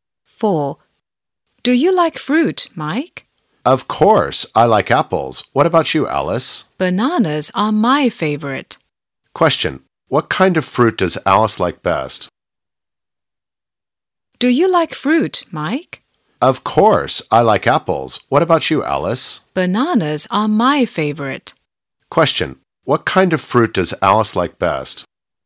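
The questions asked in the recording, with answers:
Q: What kind of fruit does Alice like best?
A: Bananas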